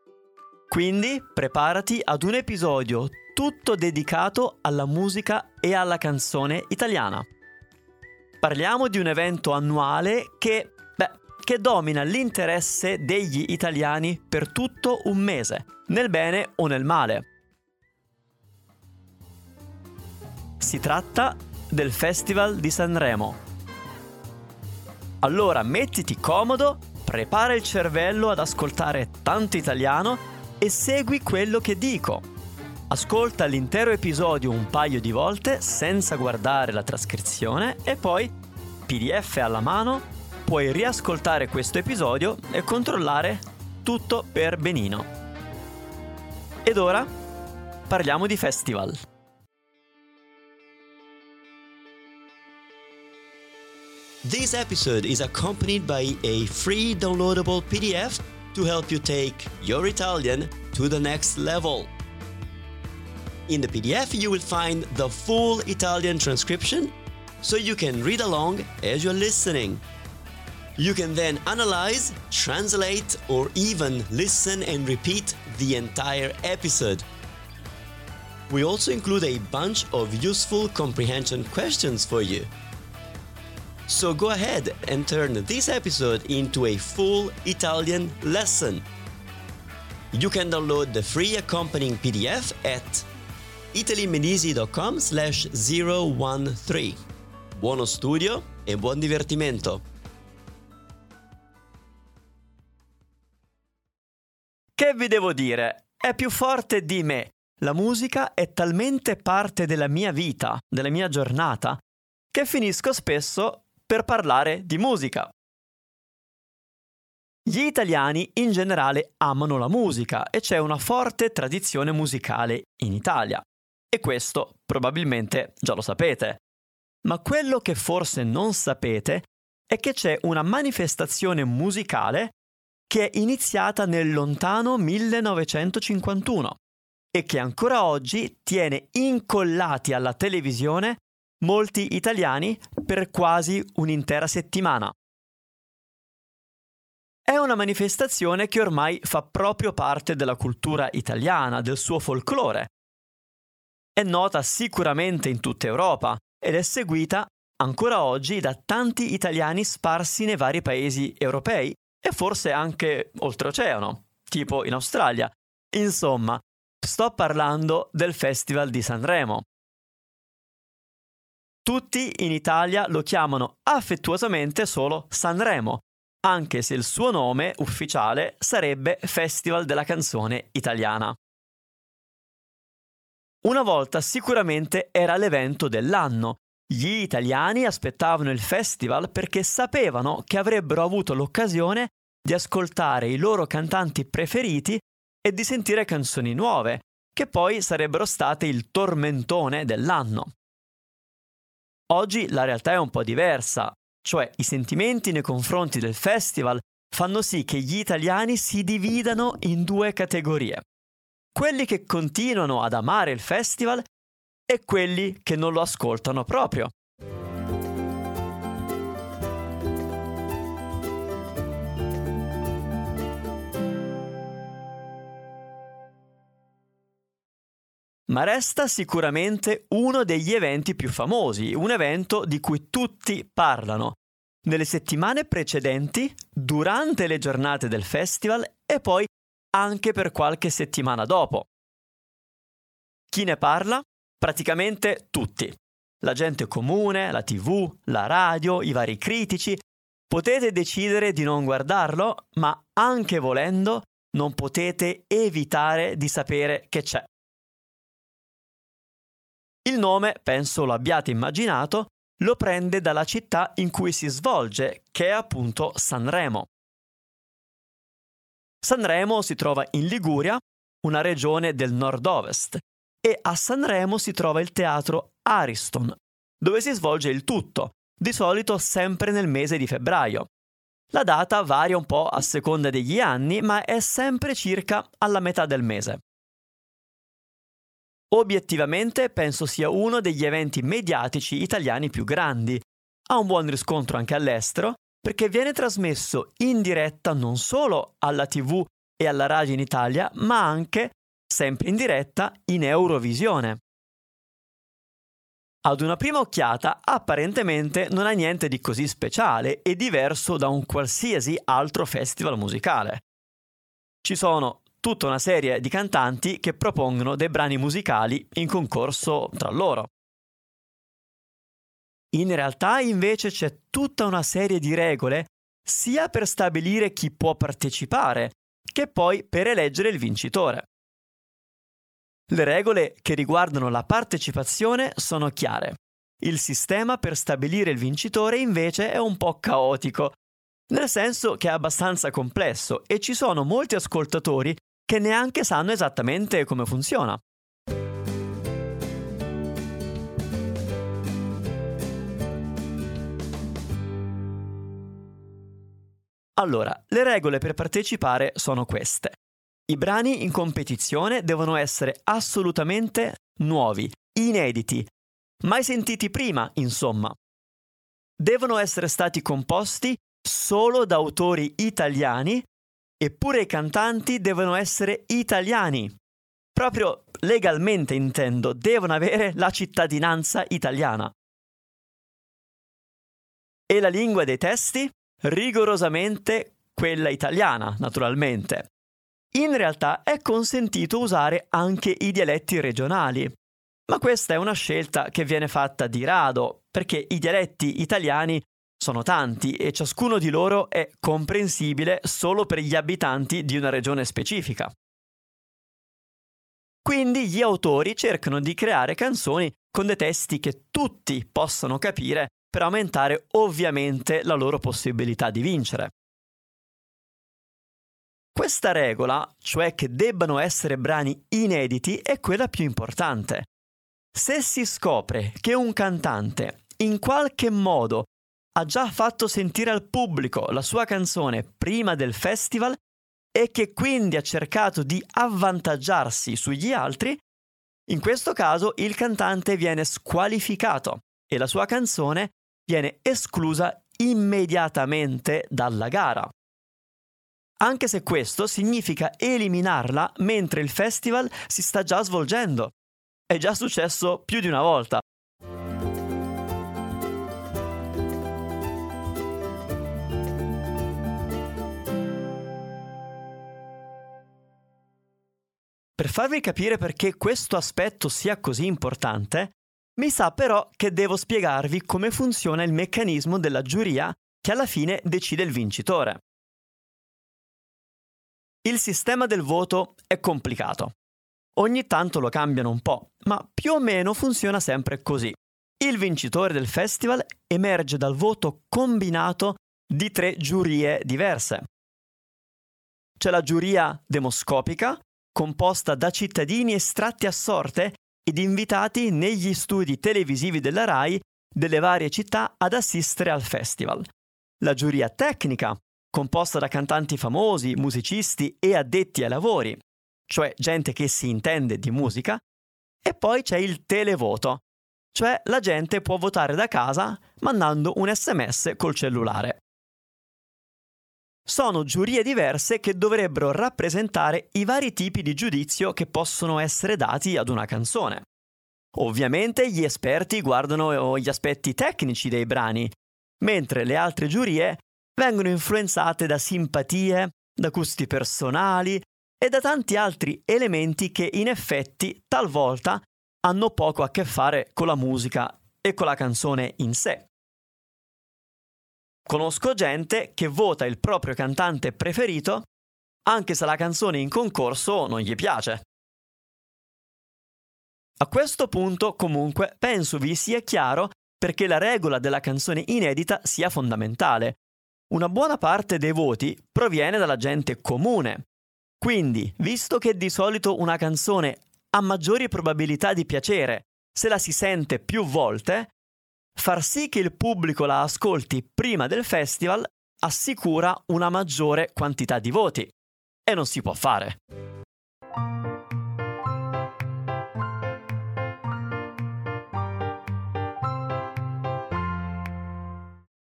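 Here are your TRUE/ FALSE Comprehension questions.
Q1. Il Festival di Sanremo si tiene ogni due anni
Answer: Falso

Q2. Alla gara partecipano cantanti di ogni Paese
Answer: Falso

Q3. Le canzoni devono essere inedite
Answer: Vero

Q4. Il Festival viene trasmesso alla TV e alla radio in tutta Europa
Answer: Vero

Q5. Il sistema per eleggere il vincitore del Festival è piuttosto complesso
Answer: Vero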